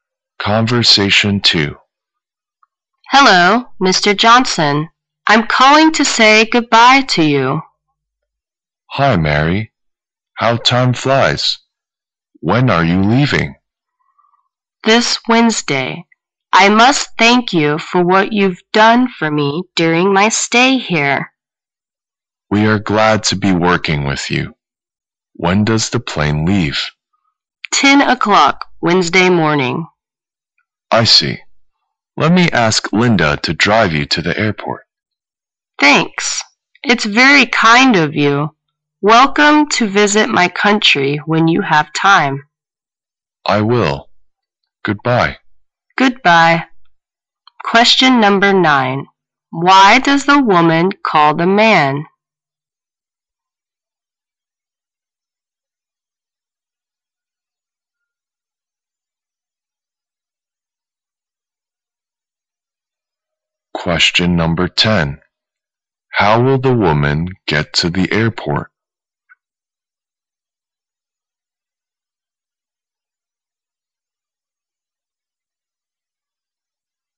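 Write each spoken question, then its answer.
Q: Why does the woman call the man?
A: To say goodbye

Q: How will the woman get to the airport?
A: Linda will drive her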